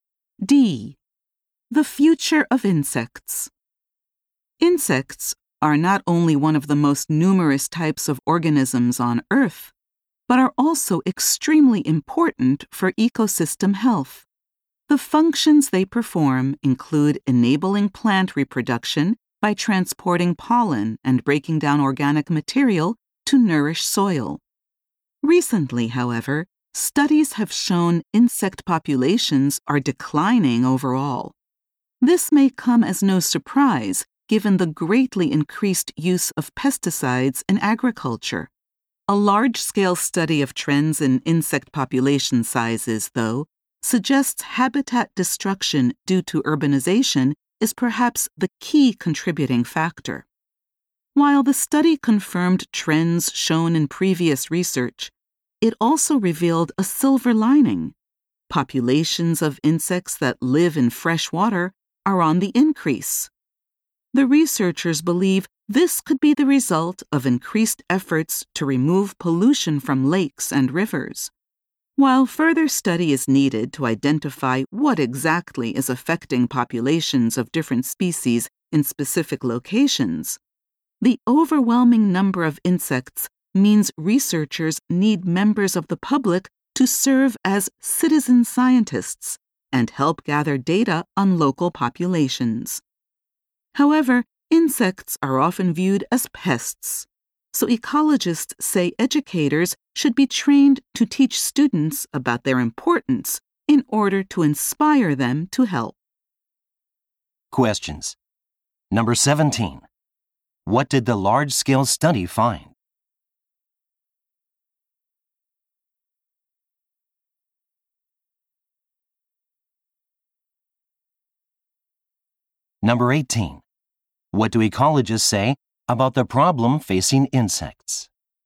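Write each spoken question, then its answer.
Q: What did the large-scale study find?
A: Habitat destruction from urbanization may be the key cause of decline, but freshwater insect populations are increasing.

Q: What do ecologists say about the problem facing insects?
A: Educators should be trained to teach students about insects' importance so they will help gather data.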